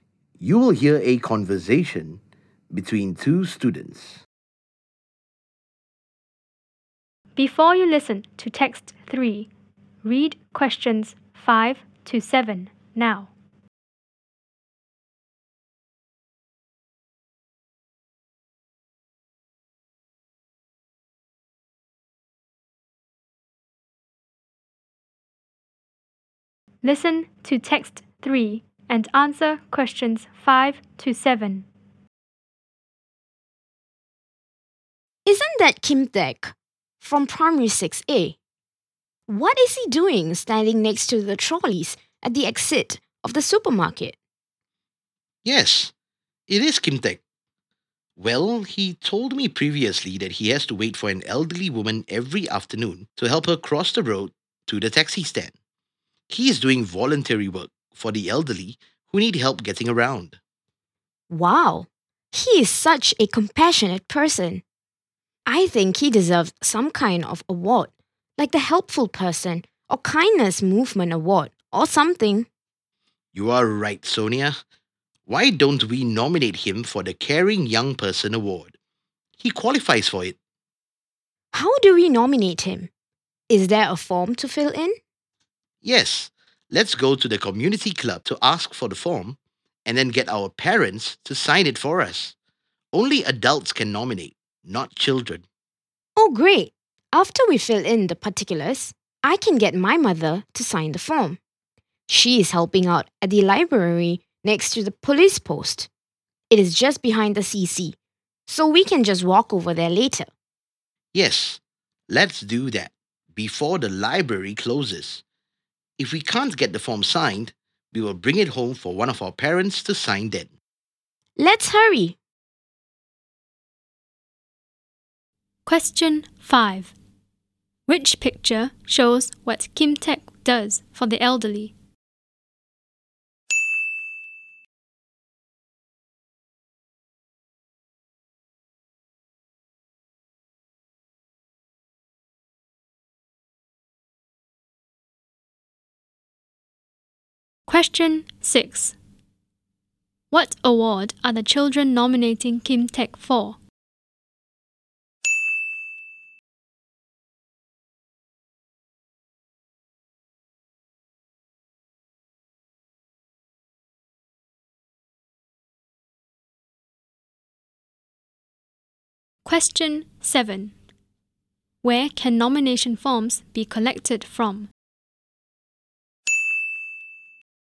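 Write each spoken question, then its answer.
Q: What award are the children nominating Kim Taek for?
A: The Caring Young Person Award

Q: Where can nomination forms be collected from?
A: The community club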